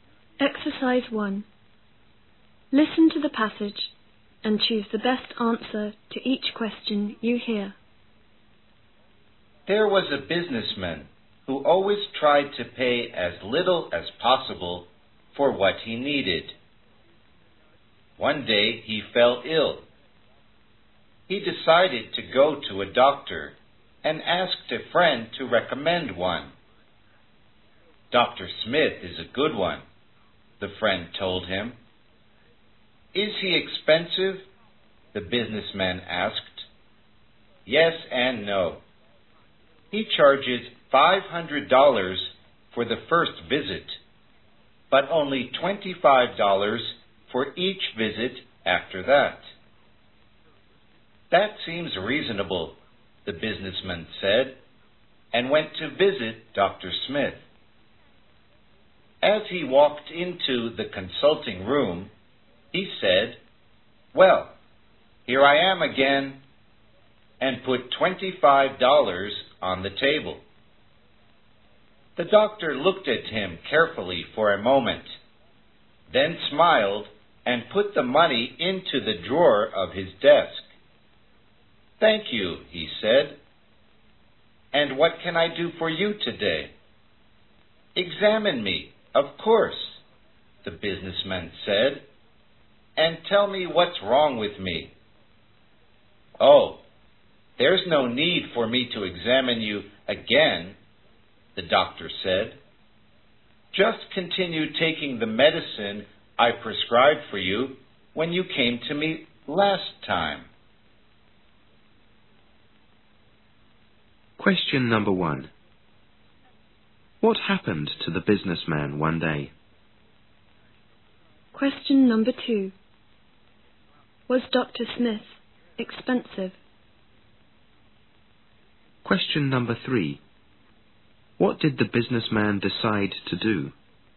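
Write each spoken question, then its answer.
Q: What happened to the businessman one day?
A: He fell ill

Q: Was Dr. Smith expensive?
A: Yes and no: $500 for the first visit, $25 for each visit after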